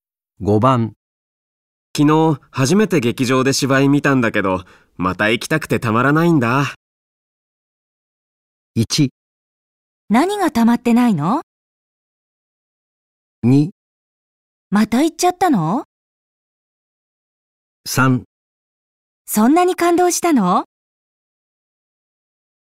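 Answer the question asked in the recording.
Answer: 3: そんなに感動したの?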